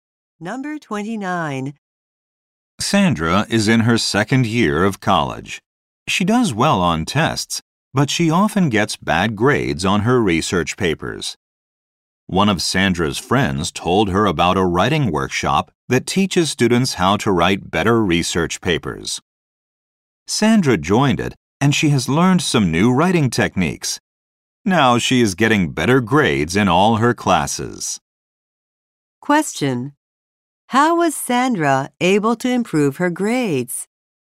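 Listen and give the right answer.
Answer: By joining a writing workshop.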